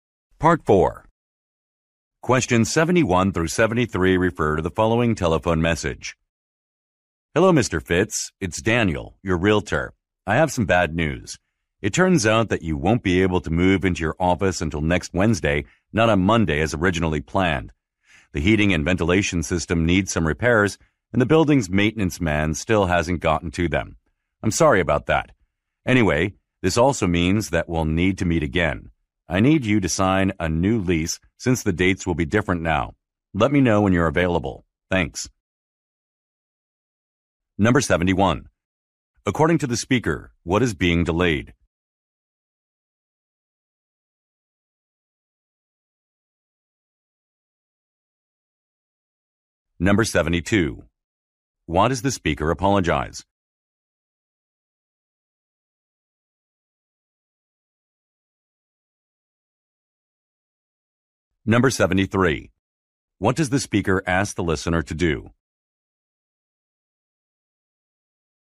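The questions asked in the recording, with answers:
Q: According to the speaker, what is being delayed?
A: Moving into the office

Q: Why does the speaker apologize?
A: Building repairs have not been done yet

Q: What does the speaker ask the listener to do?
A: Let him know when he is available to meet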